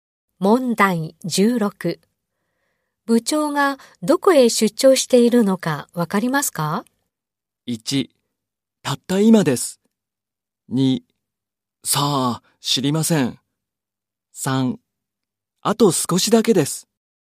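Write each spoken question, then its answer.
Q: 部長がどこへ出張しているのかわかりますか?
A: 2: さあ、知りません。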